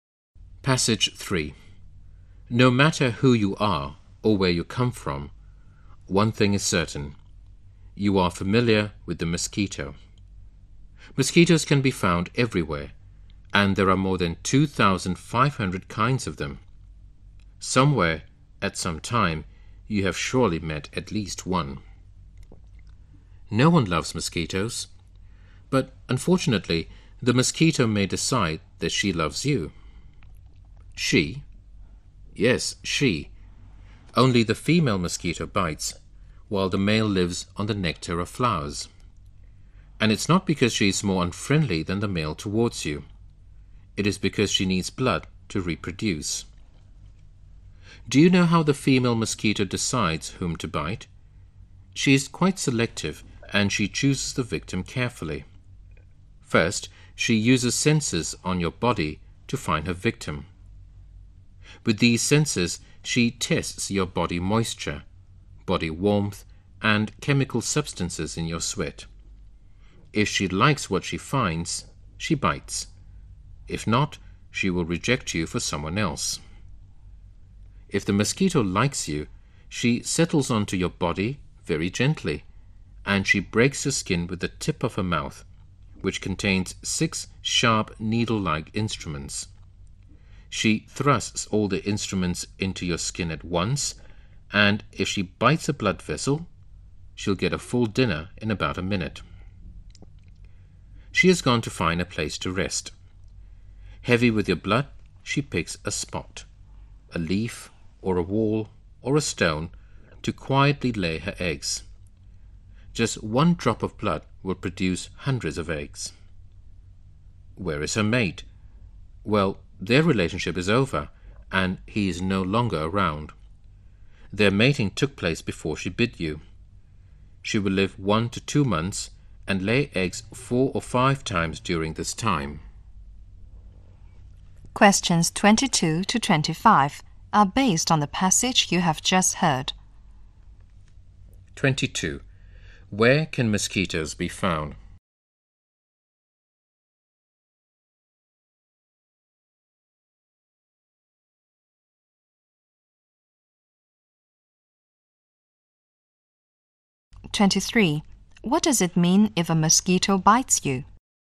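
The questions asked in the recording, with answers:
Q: Where can mosquitoes be found?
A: Everywhere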